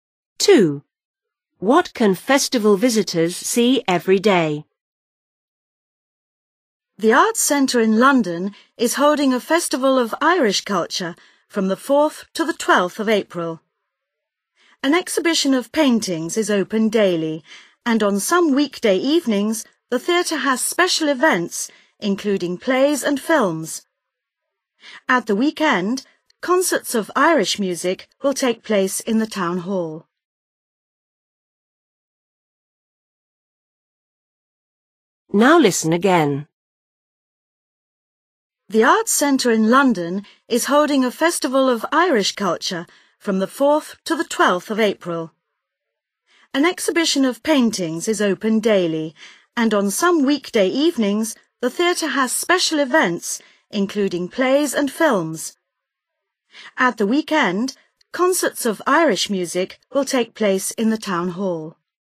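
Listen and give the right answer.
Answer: An exhibition of paintings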